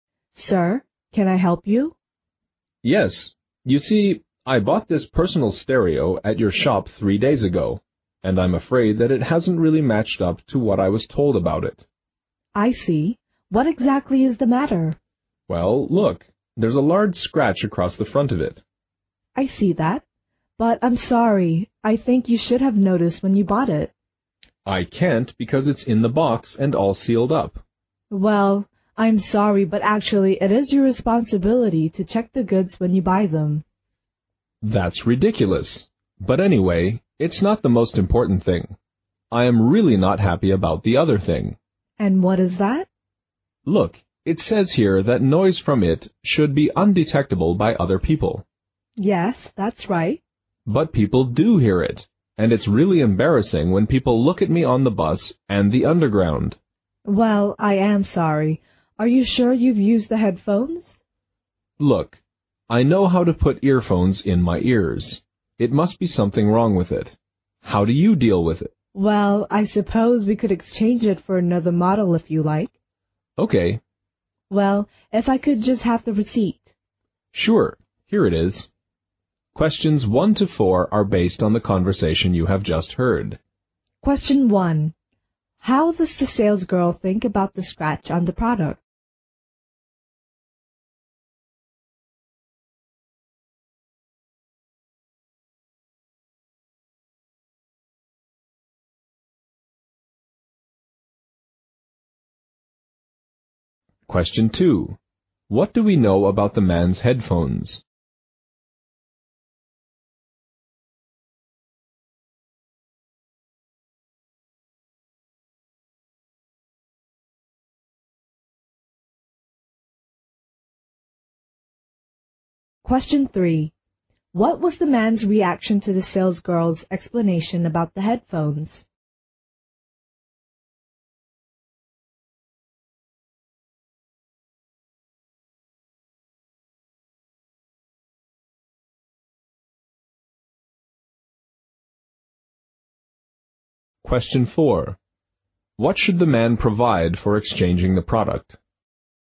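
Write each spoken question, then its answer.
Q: How does the sales girl think about the scratch on the product?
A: The man should have noticed it when he bought it; checking the goods was his responsibility.

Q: What do we know about the man's headphones?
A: Other people can hear the noise from them.

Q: What should the man provide for exchanging the product?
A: The receipt.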